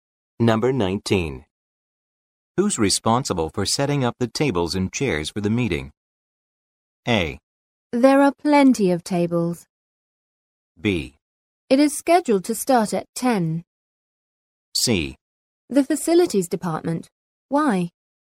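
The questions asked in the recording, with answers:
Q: Who's responsible for setting up the tables and chairs for the meeting?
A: C: The facilities department.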